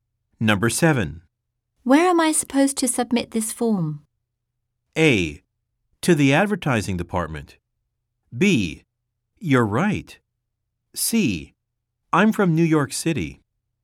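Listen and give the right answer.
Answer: A: To the advertising department.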